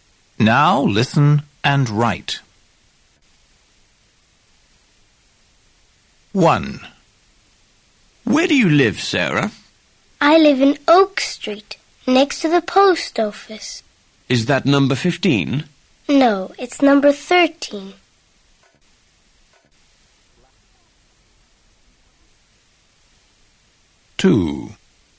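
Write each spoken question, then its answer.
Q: Where do you live, Sarah?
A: 13 Oak Street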